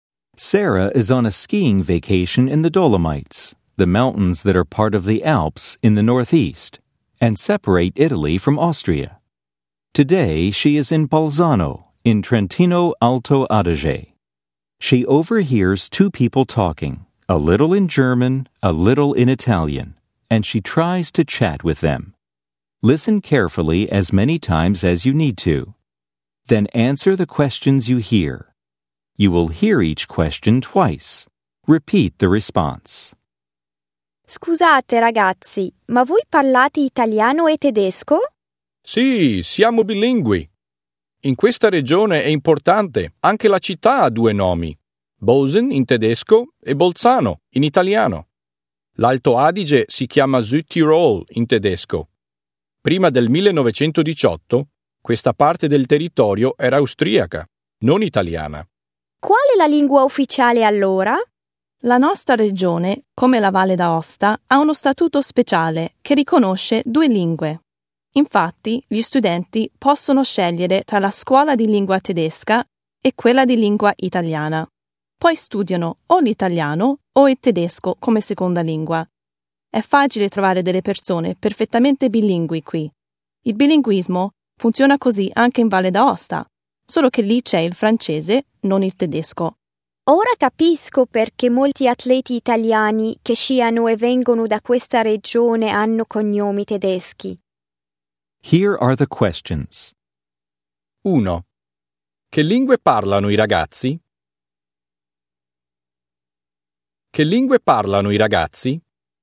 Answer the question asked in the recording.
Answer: Parlano italiano e tedesco.